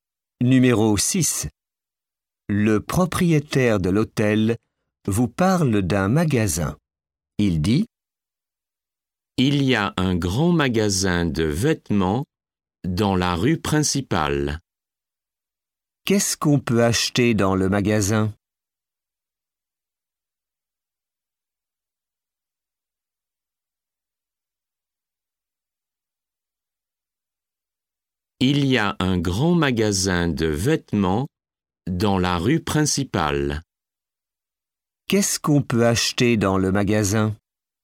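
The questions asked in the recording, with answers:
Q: Qu'est-ce qu'on peut acheter dans le magasin?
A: Des vêtements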